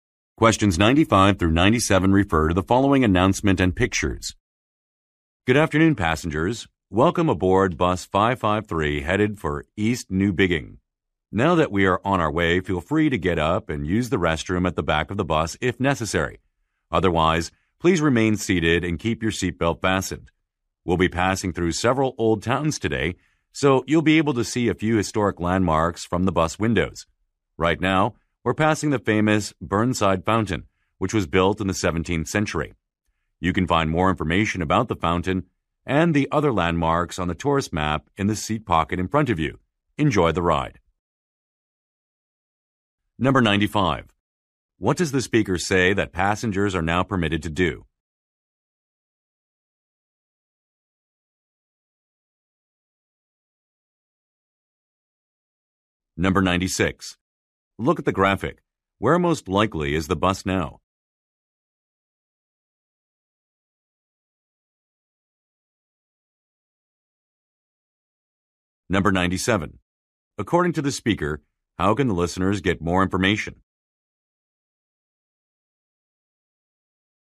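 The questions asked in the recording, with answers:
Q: What does the speaker say that passengers are now permitted to do?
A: Use the restroom

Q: According to the speaker, how can the listeners get more information?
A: From the tourist map in the seat pocket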